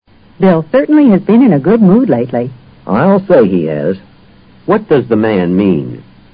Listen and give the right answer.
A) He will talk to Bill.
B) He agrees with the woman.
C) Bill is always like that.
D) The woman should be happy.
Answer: B) He agrees with the woman.

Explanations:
I'll say he has = I'll say he has been in a good mood, 显然,他是赞同她的说法的。in a good mood: 情绪很好,mood 作"心境","精神状态"解。